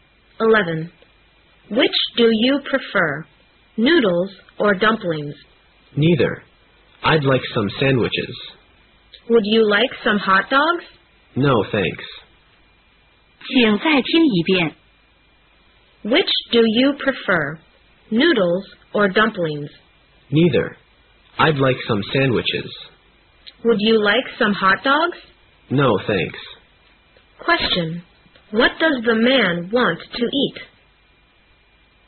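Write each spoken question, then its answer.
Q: What does the man want to eat?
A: Sandwiches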